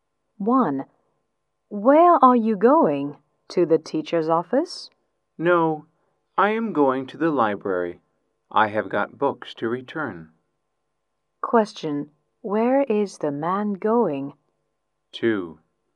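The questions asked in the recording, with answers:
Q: Where is the man going?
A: To the library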